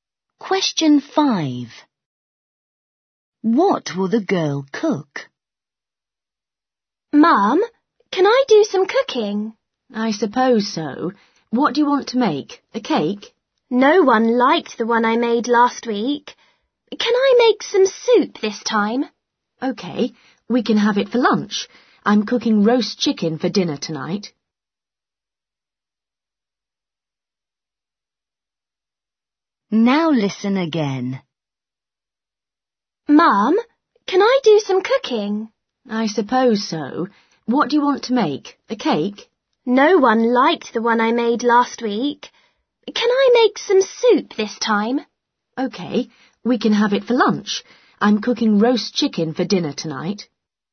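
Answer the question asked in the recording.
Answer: soup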